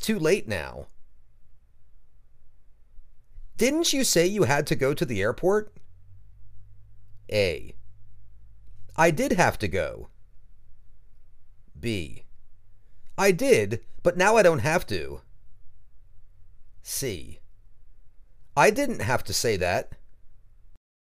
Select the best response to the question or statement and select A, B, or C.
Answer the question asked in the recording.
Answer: I did, but now I don't have to.